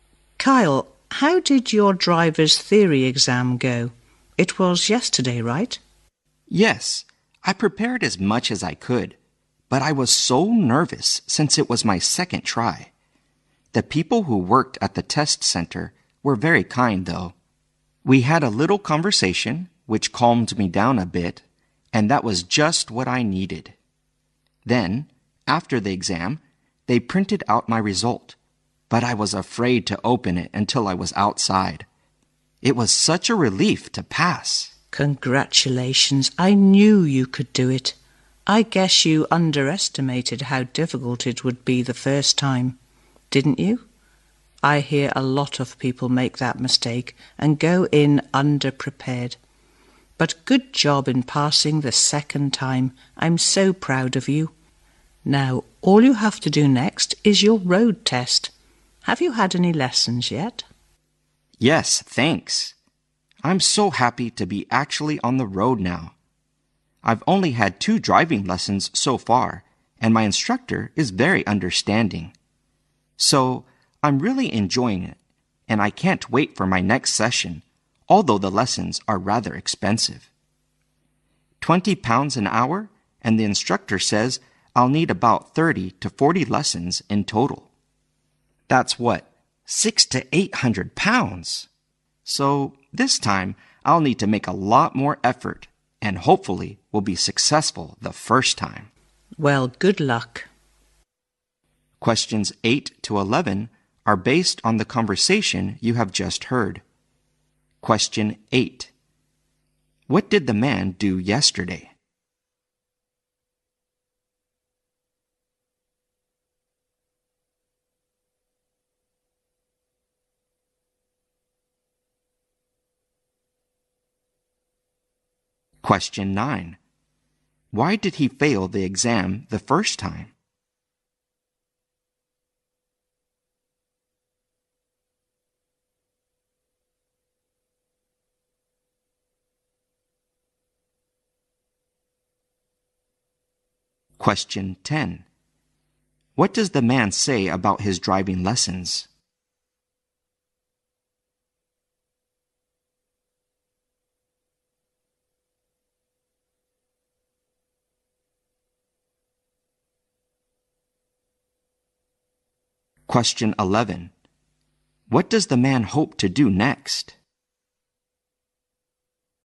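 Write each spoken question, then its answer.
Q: What did the man do yesterday?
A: He passed his driver's theory exam.

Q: Why did he fail the exam the first time?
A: He underestimated its difficulty and was underprepared.

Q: What does the man say about his driving lessons?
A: He enjoys them, but they are rather expensive.

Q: What does the man hope to do next?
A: Pass his road test the first time.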